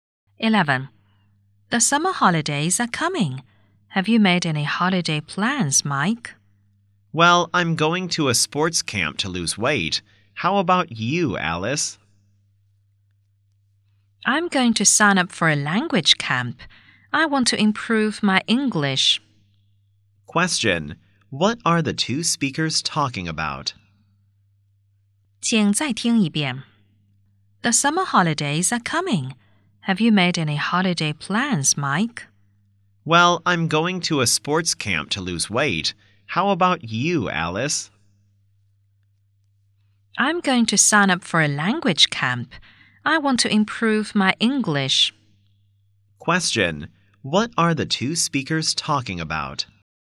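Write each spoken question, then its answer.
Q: what are the two speakers talking about?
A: Their summer holiday plans (summer camps)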